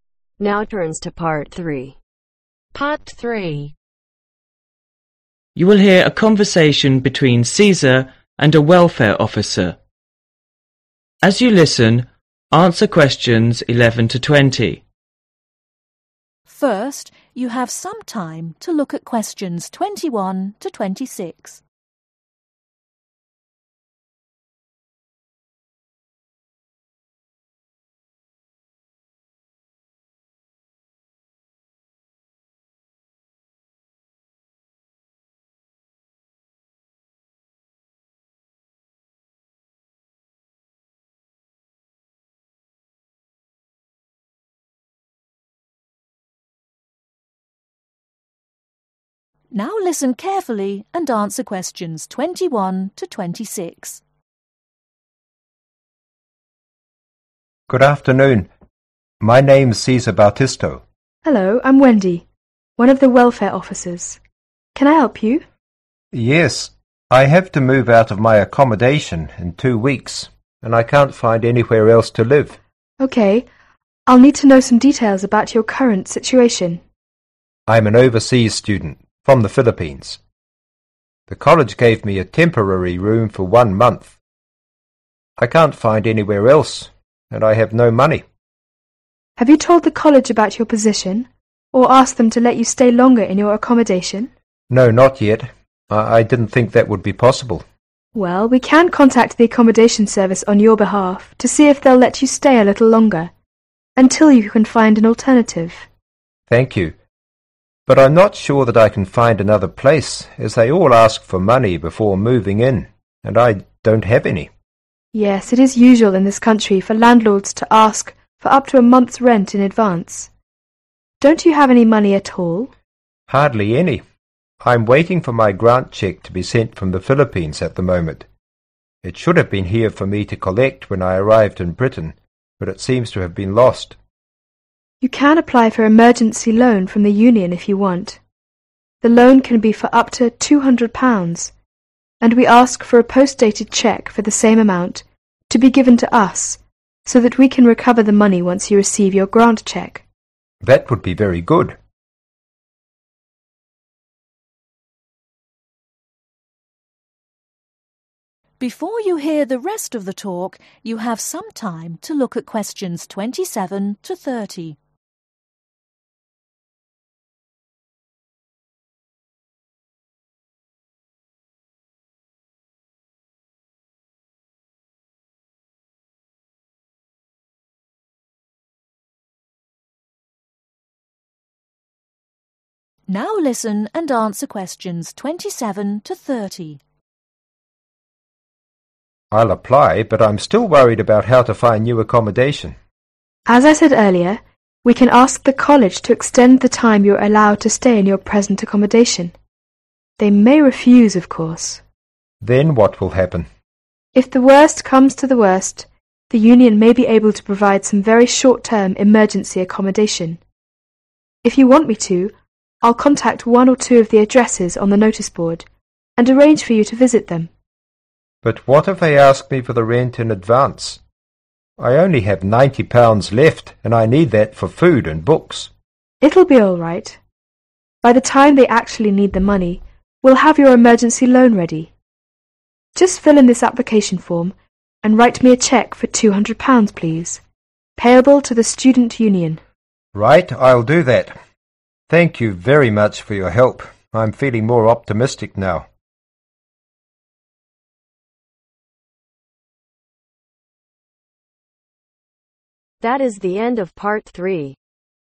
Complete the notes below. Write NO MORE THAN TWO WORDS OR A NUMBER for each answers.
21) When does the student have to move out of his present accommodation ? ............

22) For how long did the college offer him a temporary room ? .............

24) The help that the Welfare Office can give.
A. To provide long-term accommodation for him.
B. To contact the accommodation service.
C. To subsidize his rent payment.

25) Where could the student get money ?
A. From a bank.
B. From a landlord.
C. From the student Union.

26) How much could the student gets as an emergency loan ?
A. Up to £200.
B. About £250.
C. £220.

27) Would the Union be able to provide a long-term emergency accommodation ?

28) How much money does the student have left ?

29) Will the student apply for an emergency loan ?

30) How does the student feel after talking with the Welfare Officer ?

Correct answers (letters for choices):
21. 2 weeks
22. 1 month
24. B
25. C
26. A
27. NO
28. £90
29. YES
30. Optimistic